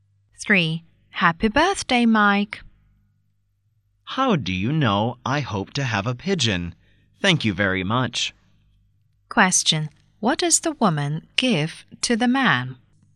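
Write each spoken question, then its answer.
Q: What does the woman give to the man?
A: A pigeon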